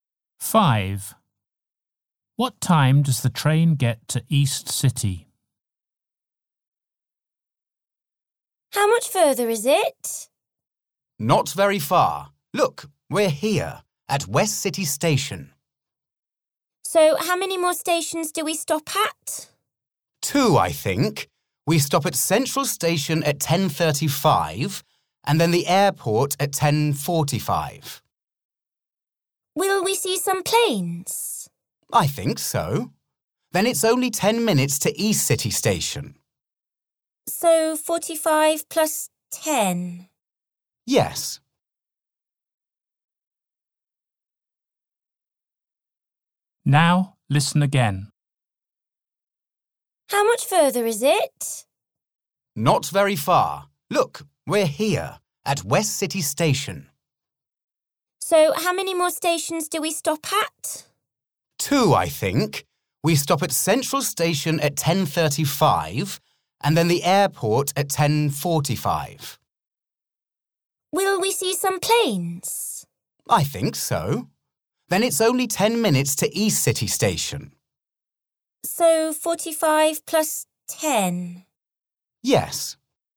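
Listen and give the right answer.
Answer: 10:55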